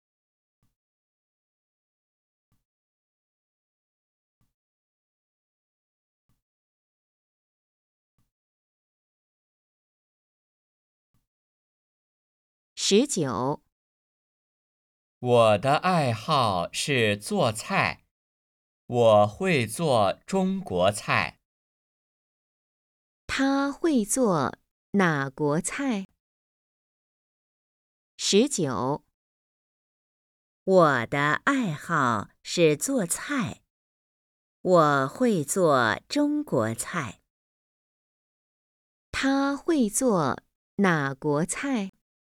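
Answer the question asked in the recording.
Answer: 中国菜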